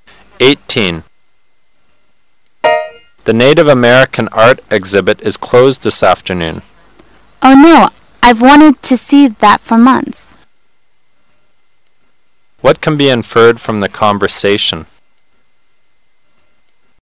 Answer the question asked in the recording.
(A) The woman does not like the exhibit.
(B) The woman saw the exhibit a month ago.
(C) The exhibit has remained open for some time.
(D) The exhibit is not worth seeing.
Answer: (C) The exhibit has remained open for some time.

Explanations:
M: The native American art exhibit is closed this afternoon. W: Oh, no, I've wanted to see that for months.